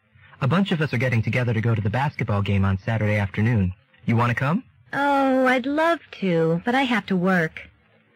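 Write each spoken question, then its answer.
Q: What will the woman probably do on Saturday?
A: Work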